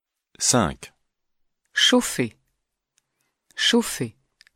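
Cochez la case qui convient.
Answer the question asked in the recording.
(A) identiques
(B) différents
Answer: (A) identiques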